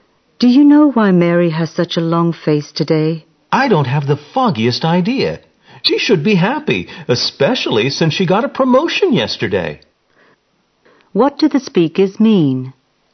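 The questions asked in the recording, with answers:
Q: What do the speakers mean?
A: Neither knows why Mary looks unhappy despite her promotion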